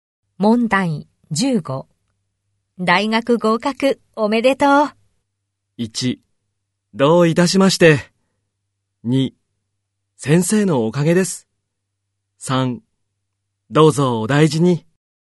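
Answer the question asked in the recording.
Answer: 2: 先生のおかげです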